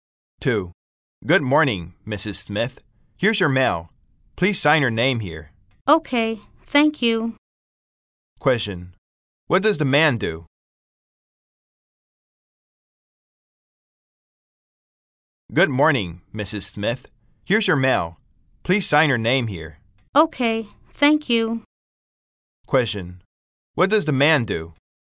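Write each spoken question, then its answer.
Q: What does the man do?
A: He is a mail carrier.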